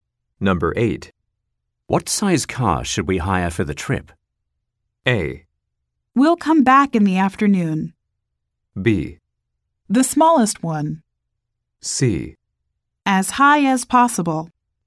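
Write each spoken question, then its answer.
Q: What size car should we hire for the trip?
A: B: The smallest one.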